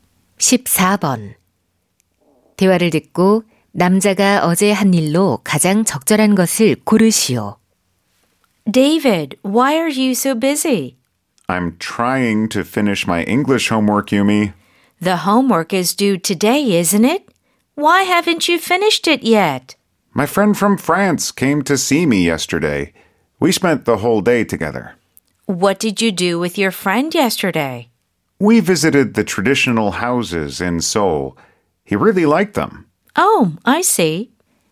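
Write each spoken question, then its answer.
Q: 대화를 듣고 남자가 어제 한 일로 가장 적절한 것을 고르시오.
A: 서울의 전통 가옥 방문하기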